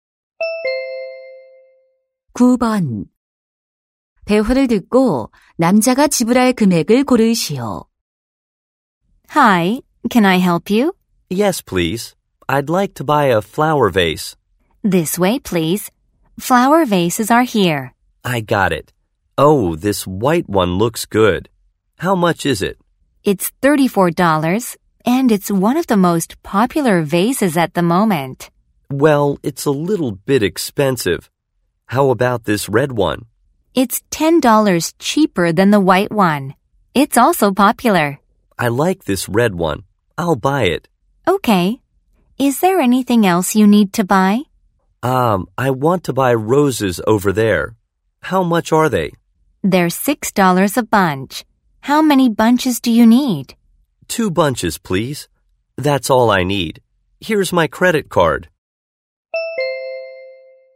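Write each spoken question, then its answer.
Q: 대화를 듣고 남자가 지불할 금액을 고르시오.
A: $36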